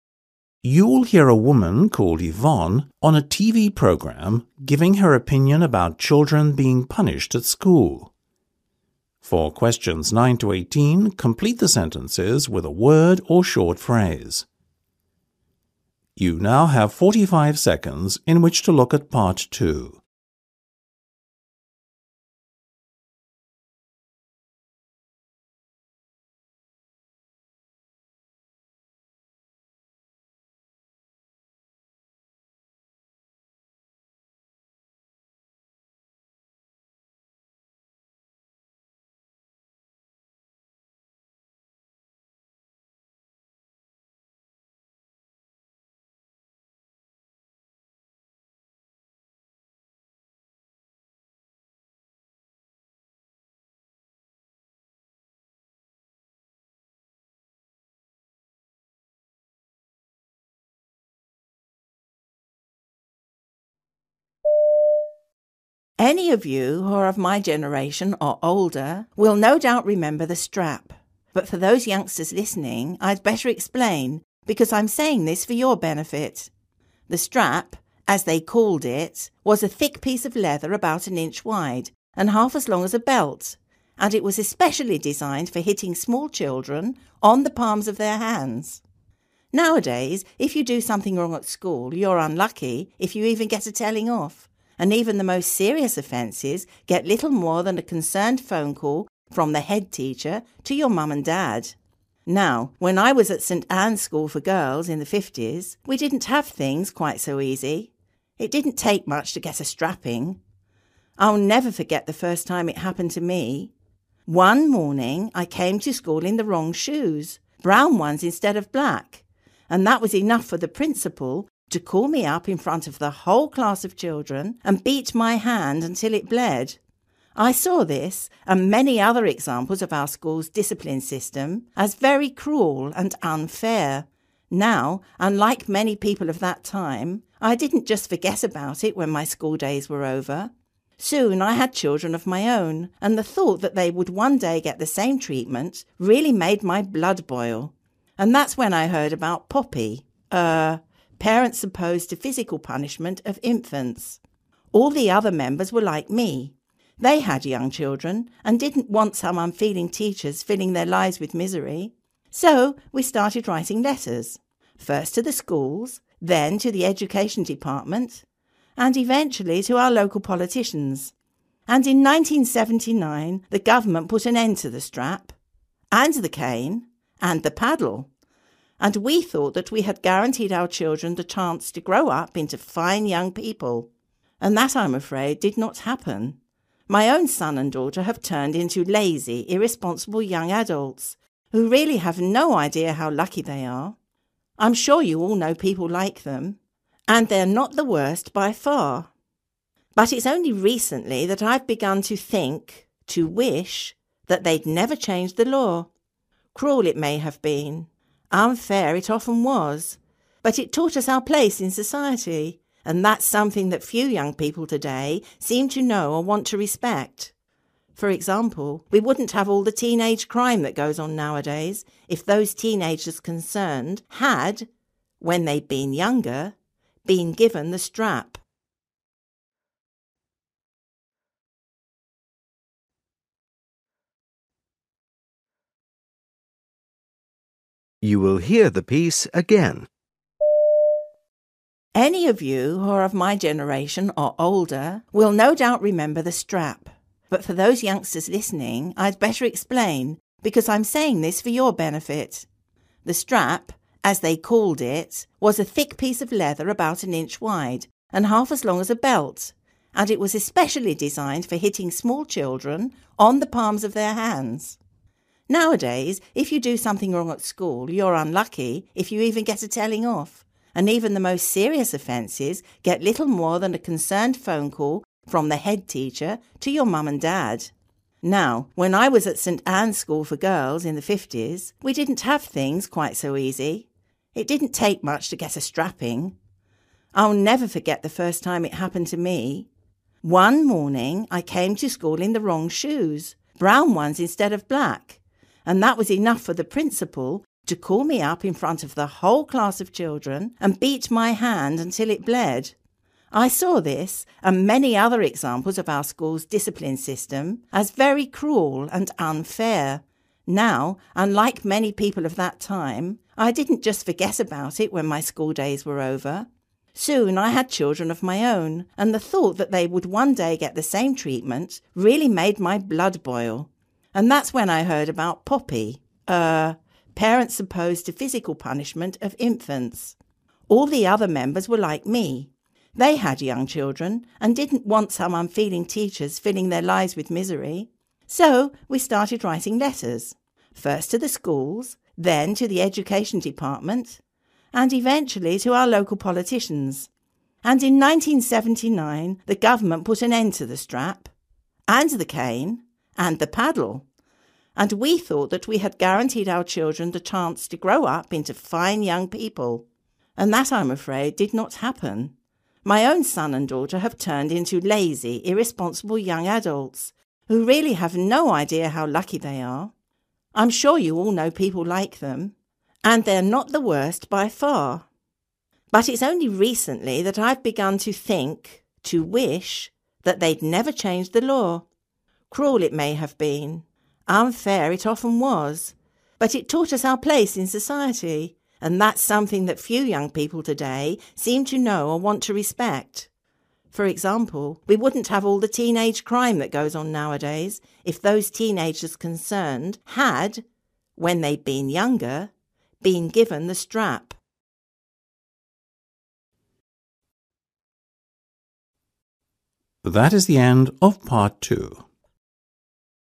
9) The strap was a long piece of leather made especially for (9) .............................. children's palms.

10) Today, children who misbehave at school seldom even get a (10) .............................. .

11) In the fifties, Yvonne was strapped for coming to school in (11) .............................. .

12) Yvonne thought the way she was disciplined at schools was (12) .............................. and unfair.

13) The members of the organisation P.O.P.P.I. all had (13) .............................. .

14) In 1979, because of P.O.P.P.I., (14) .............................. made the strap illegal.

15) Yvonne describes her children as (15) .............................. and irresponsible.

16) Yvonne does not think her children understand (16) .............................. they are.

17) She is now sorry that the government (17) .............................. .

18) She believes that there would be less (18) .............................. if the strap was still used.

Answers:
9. hitting
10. telling off
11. the wrong shoes
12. (very) cruel
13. young children
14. the government
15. lazy
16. how lucky
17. changed the law
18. (teenage) crime

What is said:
Yvonne: Any of you who are of my generation or older will no doubt remember ... the strap. But for those youngsters listening, I'd better explain because I'm saying this for your benefit. The strap, as they called it, was a thick piece of leather about an inch wide and half as long as a belt and it was especially designed for hitting small children, on the palms of their hands. Nowadays, if you do something wrong at school, you're unlucky if you even get a telling off. And even the most serious offences get little more than a concerned phone call from the head teacher to your mum and dad. Now, when I was at St Anne's School for Girls in the fifties, we didn't have things quite so easy. It didn't take much to get a strapping. I'll never forget the first time it happened to me. One morning, I came to school in the wrong shoes – brown ones instead of black – and that was enough for the principal to call me up in front of the whole class of children and beat my hand until it bled. I saw this and many other examples of our school's discipline system as very cruel and unfair.
Now, unlike many people of that time, I didn't just forget about it when my school days were over. Soon I had children of my own and the thought that they would one day get the same treatment, really made my blood boil ... and that's when I heard about P.O.P.P.I. Parents Opposed to Physical Punishment of Infants. All the other members were like me. They had young children and didn't want some unfeeling teachers filling their lives with misery. So we started writing letters.
First, to the schools, then to the education department and eventually, to our local politicians, and in 1979, the government put an end to the strap ... and to the cane ... and to the paddle and we thought that we had guaranteed our children the chance to grow up into fine young people. And that, I'm afraid, did not happen. My own son and daughter have turned into lazy, irresponsible young adults who really have no idea how lucky they are. I'm sure you all know people like them ... and they're not the worst by far. But it's only recently that I've begun to think – to wish – that they'd never changed the law. Cruel it may have been, unfair it often was, but it taught us our place in society. And that's something that few young people today seem to know or want to respect. For example, we wouldn't have all the teenage crime that goes on nowadays if those teenagers concerned had, when they'd been younger, been given the strap.

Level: B2